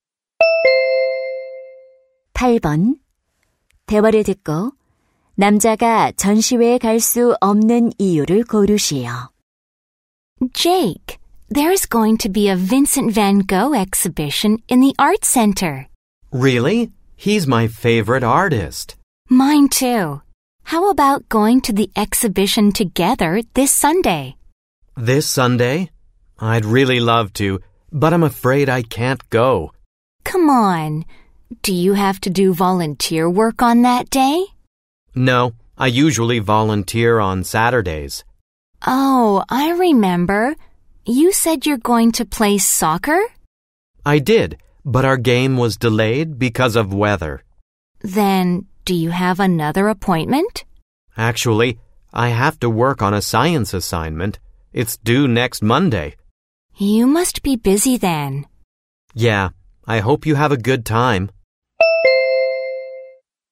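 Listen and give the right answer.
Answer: 과학 과제를 해야 해서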